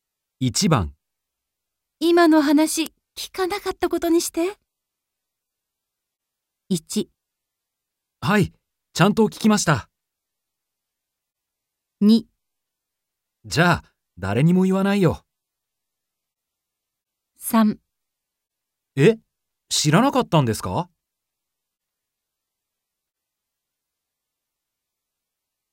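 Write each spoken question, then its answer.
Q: 今の話、聞かなかったことにして。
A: 2: じゃあ、誰にも言わないよ。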